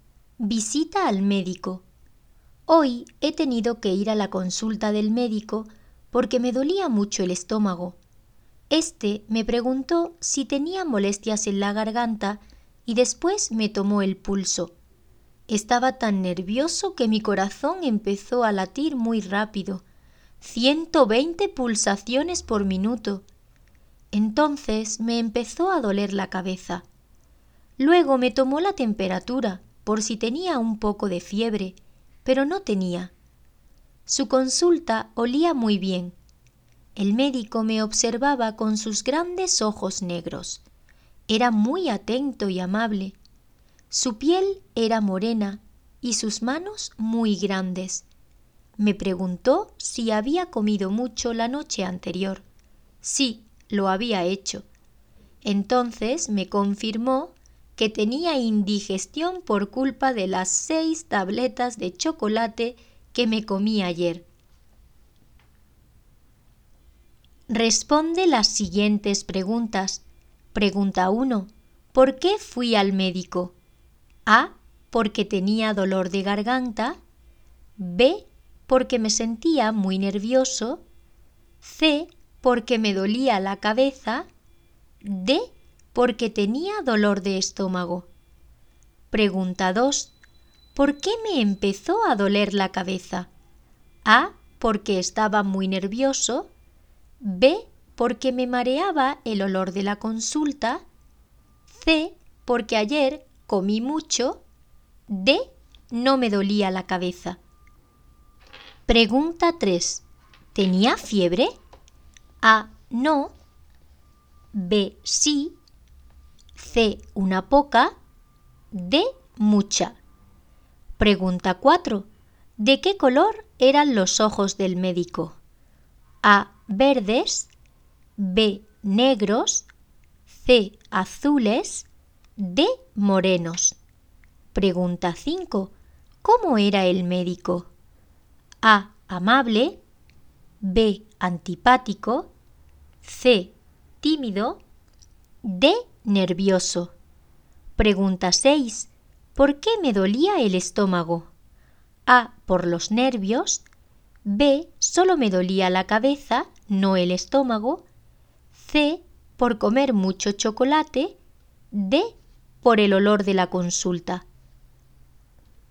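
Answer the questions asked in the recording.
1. D: Porque tenía dolor de estómago.
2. A: Porque estaba muy nervioso.
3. A: No.
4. B: Negros.
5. A: Amable.
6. C: Por comer mucho chocolate.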